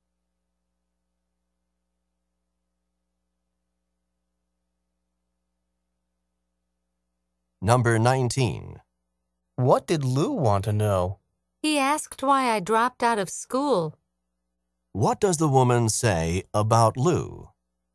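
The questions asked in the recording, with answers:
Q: What does the woman say about Lou?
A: Lou asked why she dropped out of school.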